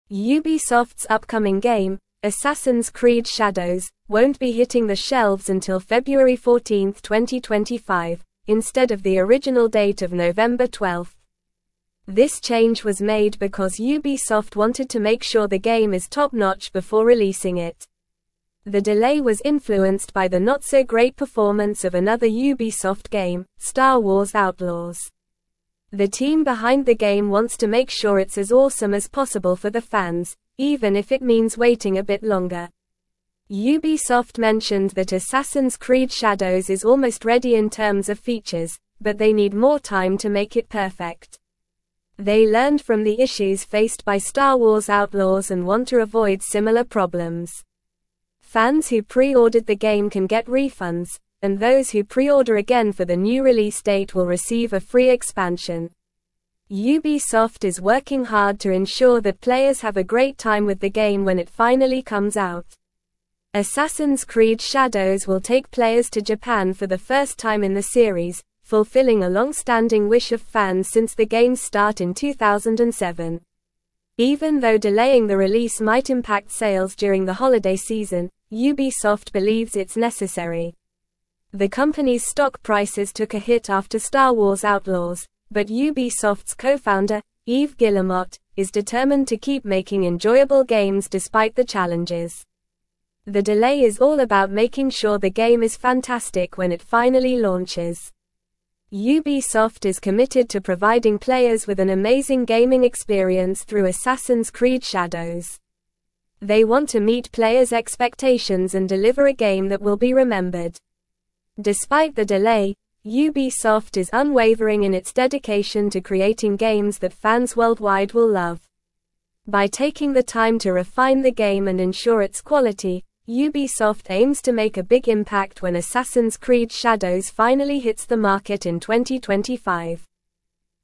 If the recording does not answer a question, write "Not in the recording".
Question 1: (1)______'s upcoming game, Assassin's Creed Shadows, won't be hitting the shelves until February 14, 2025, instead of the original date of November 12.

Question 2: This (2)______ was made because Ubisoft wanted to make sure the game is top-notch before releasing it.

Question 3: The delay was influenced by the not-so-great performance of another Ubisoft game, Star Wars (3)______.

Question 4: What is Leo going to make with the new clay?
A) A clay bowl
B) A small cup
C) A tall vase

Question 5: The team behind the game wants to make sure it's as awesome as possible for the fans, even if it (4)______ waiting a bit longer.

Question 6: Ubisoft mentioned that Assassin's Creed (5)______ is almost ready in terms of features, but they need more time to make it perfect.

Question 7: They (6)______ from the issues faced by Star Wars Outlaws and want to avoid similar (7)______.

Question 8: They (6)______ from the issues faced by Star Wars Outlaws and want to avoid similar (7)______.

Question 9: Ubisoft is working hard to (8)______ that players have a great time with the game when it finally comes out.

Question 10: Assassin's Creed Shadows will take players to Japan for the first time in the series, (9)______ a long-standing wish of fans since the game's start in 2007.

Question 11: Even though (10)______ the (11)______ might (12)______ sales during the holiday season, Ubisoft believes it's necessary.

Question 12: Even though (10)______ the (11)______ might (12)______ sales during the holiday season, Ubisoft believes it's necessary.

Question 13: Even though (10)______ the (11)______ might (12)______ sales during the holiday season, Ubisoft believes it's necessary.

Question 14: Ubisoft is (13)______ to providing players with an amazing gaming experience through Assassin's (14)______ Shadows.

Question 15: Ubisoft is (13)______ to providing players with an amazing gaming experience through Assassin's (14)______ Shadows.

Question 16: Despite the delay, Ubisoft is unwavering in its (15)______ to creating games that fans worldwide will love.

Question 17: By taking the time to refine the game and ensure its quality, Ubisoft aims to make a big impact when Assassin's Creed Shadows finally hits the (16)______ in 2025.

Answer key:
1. Ubisoft
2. change
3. Outlaws
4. Not in the recording
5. means
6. Shadows
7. learned
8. problems
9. ensure
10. fulfilling
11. delaying
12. release
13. impact
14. committed
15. Creed
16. dedication
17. market

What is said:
Ubisoft's upcoming game, Assassin's Creed Shadows, won't be hitting the shelves until February 14, 2025, instead of the original date of November 12. This change was made because Ubisoft wanted to make sure the game is top-notch before releasing it. The delay was influenced by the not-so-great performance of another Ubisoft game, Star Wars Outlaws. The team behind the game wants to make sure it's as awesome as possible for the fans, even if it means waiting a bit longer.
Ubisoft mentioned that Assassin's Creed Shadows is almost ready in terms of features, but they need more time to make it perfect. They learned from the issues faced by Star Wars Outlaws and want to avoid similar problems. Fans who pre-ordered the game can get refunds, and those who pre-order again for the new release date will receive a free expansion. Ubisoft is working hard to ensure that players have a great time with the game when it finally comes out.
Assassin's Creed Shadows will take players to Japan for the first time in the series, fulfilling a long-standing wish of fans since the game's start in 2007. Even though delaying the release might impact sales during the holiday season, Ubisoft believes it's necessary. The company's stock prices took a hit after Star Wars Outlaws, but Ubisoft's co-founder, Yves Guillemot, is determined to keep making enjoyable games despite the challenges. The delay is all about making sure the game is fantastic when it finally launches.
Ubisoft is committed to providing players with an amazing gaming experience through Assassin's Creed Shadows. They want to meet players' expectations and deliver a game that will be remembered. Despite the delay, Ubisoft is unwavering in its dedication to creating games that fans worldwide will love. By taking the time to refine the game and ensure its quality, Ubisoft aims to make a big impact when Assassin's Creed Shadows finally hits the market in 2025.

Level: Level 3